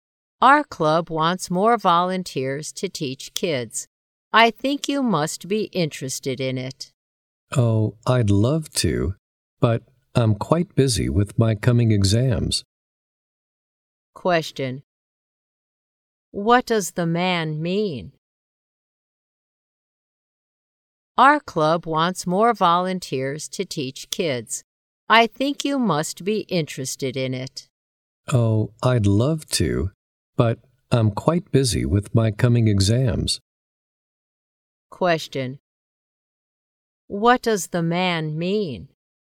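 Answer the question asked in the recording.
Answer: He is too busy with his coming exams to volunteer.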